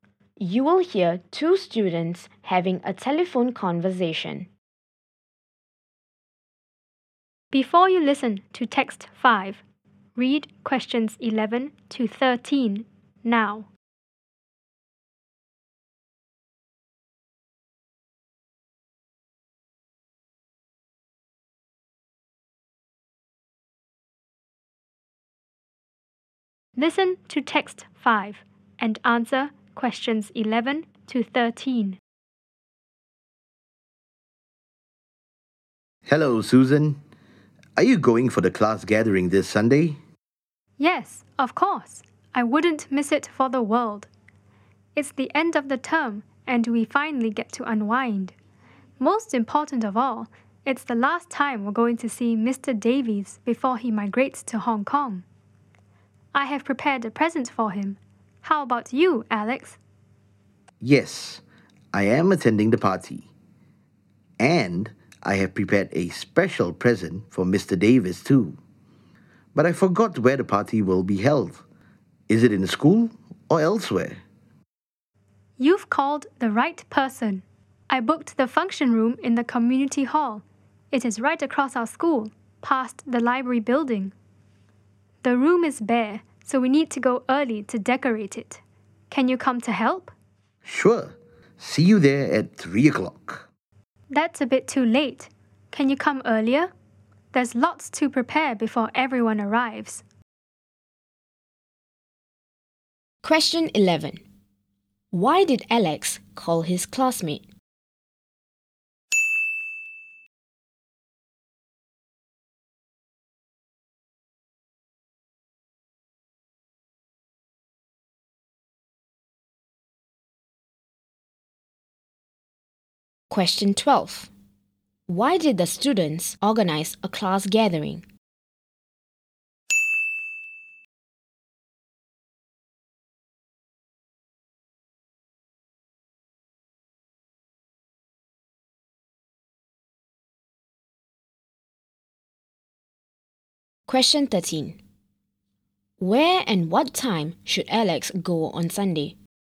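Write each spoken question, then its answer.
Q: Why did Alex call his classmate?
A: To find out where the class party would be held

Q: Why did the students organize a class gathering?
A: It is the end of term and the last chance to see Mr. Davies before he moves to Hong Kong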